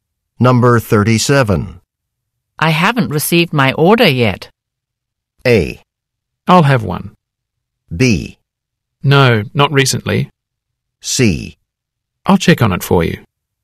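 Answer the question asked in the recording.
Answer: C: I'll check on it for you.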